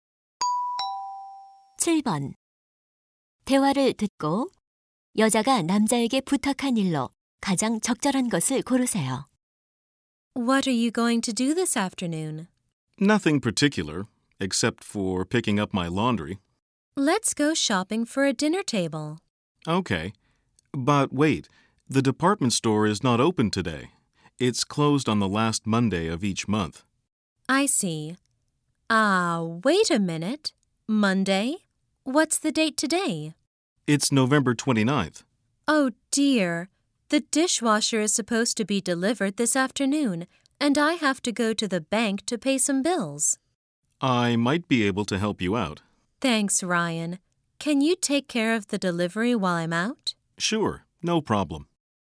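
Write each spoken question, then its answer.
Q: 대화를 듣고 여자가 남자에게 부탁한 일로 가장 적절한 것을 고르세요.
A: 식기세척기 배달 받아 주기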